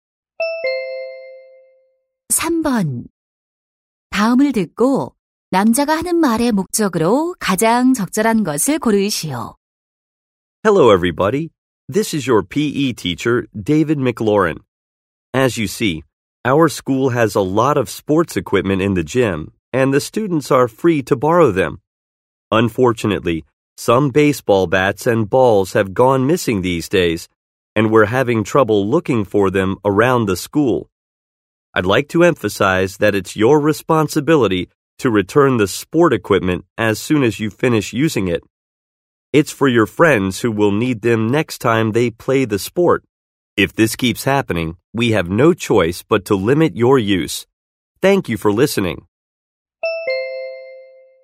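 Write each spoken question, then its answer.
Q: 다음을 듣고 남자가 하는 말의 목적으로 가장 적절한 것을 고르시오.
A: 사용한 체육 용품을 즉시 반납할 것을 당부하려고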